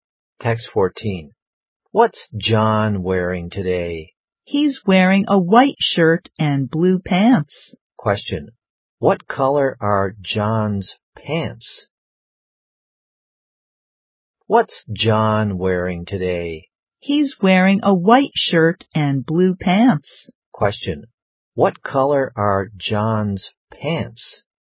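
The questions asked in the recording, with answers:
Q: What color are John's pants?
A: Blue.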